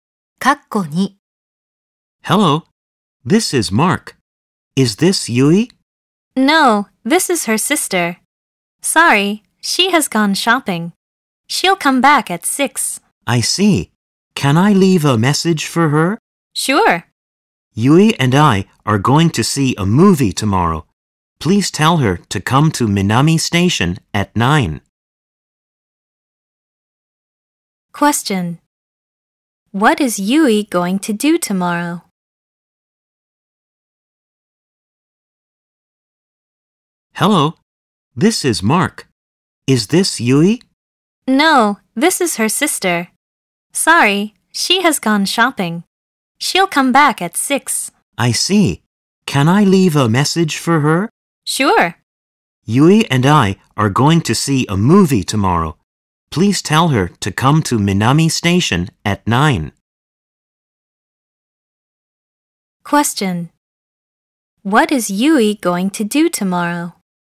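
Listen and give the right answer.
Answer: See a movie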